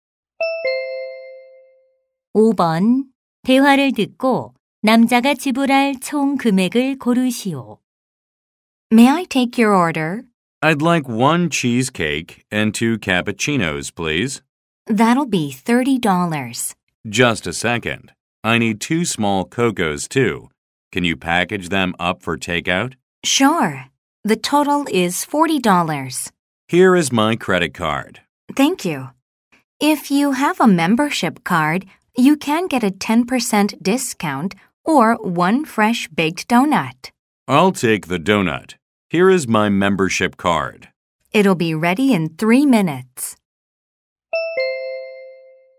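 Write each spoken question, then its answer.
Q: 대화를 듣고 남자가 지불할 총 금액을 고르시오.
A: 40달러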